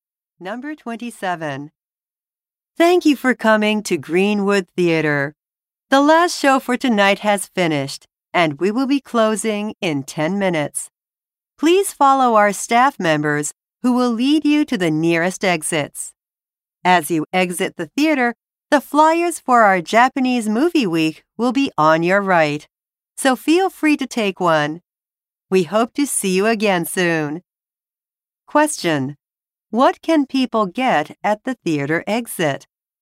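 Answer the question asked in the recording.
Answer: Flyers for Japanese Movie Week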